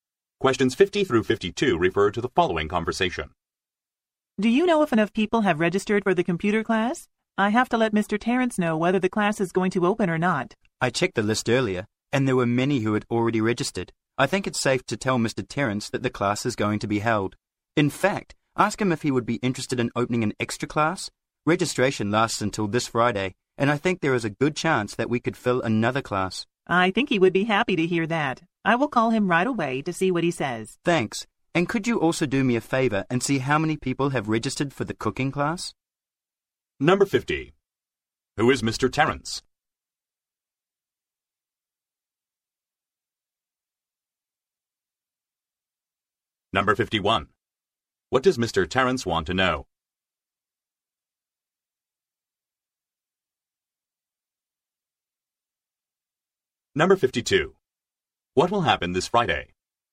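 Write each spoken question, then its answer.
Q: What does Mr. Terrence want to know?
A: Whether the computer class will open

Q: What will happen this Friday?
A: Registration will end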